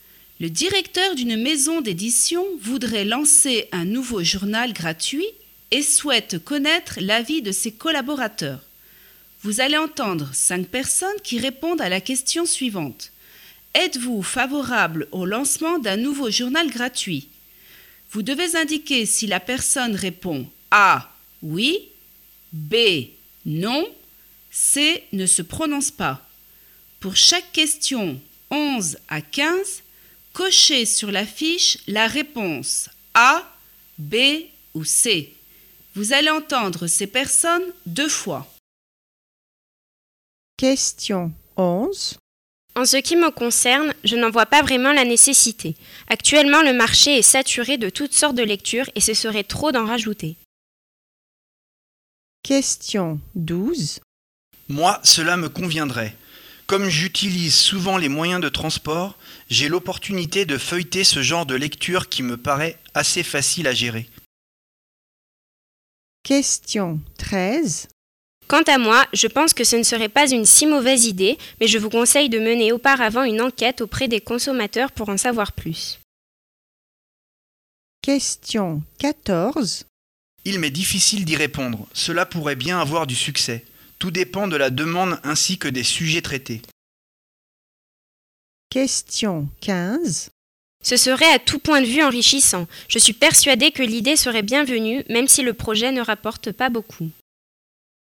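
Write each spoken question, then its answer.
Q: Êtes-vous favorable au lancement d'un nouveau journal gratuit?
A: B: Non

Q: Êtes-vous favorable au lancement d'un nouveau journal gratuit?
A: A: Oui

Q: Êtes-vous favorable au lancement d'un nouveau journal gratuit?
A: C: Ne se prononce pas

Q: Êtes-vous favorable au lancement d'un nouveau journal gratuit?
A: A: Oui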